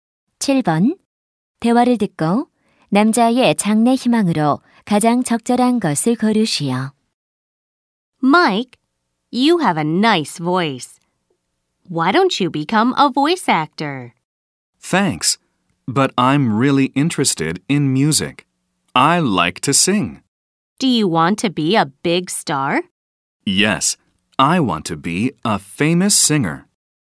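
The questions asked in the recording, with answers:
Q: 대화를 듣고 남자의 장래 희망으로 가장 적절한 것을 고르시오.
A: 가수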